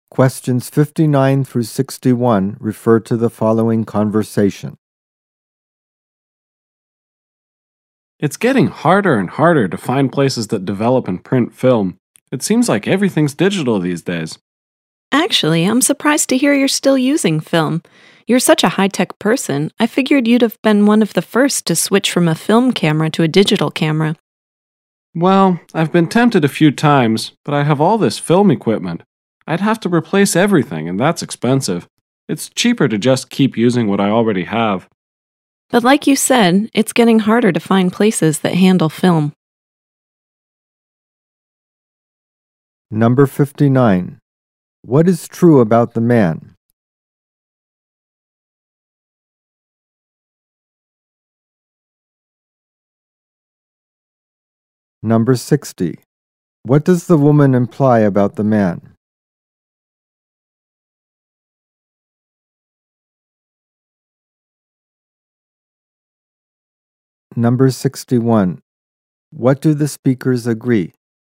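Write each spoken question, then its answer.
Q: What is true about the man?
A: He still uses a film camera.

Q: What does the woman imply about the man?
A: He is a high-tech person.

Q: What do the speakers agree?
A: It is getting harder to find places that develop film.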